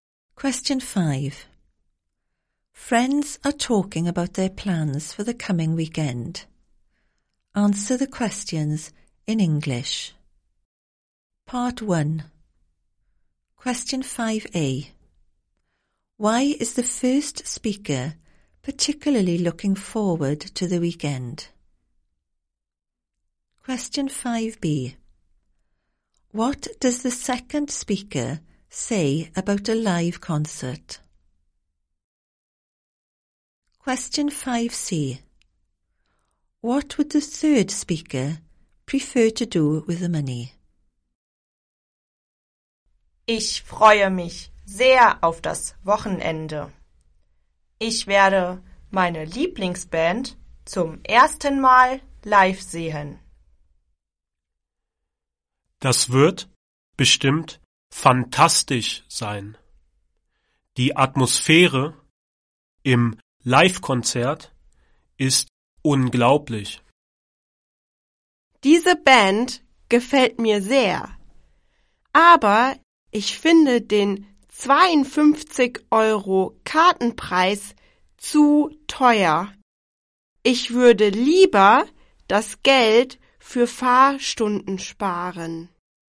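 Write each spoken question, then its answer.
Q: Why is the first speaker particularly looking forward to the weekend?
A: Will see favourite band live for the first time

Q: What does the second speaker say about a live concert?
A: The atmosphere is incredible

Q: What would the third speaker prefer to do with the money?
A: Save it for driving lessons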